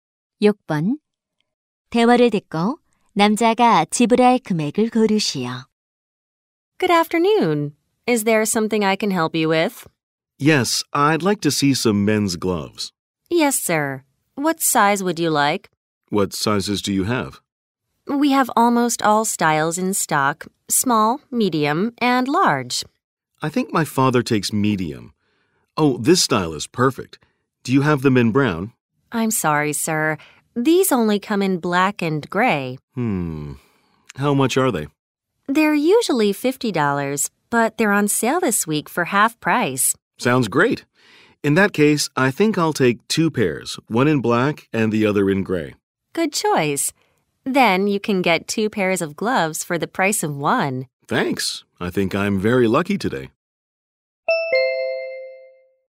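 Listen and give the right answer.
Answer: 50달러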